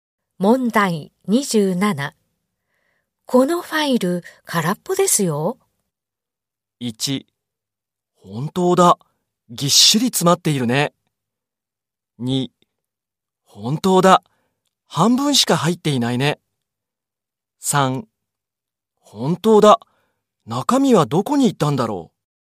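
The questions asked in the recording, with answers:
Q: このファイル空っぽですよ。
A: 3: 本当だ。中身はどこに行ったんだろう。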